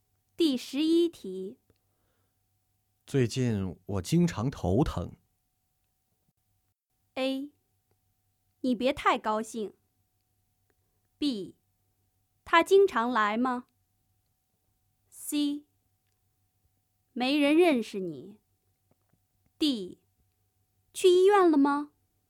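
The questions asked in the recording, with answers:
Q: 最近我经常头疼。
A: D: 去医院了吗?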